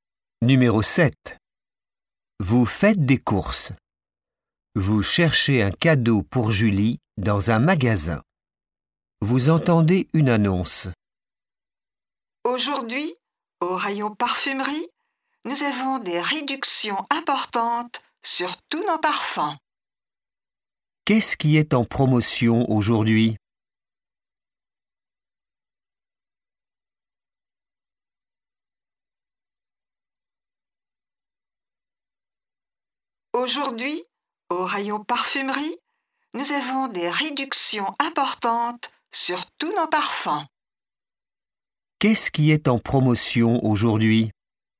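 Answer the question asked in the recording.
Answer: Les parfums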